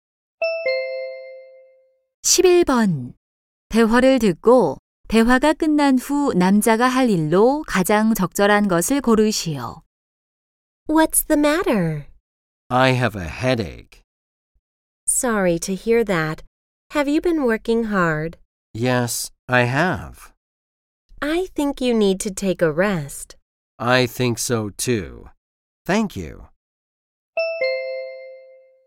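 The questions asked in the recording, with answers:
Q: 대화를 듣고 대화가 끝난 후 남자가 할 일로 가장 적절한 것을 고르시오.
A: 휴식하기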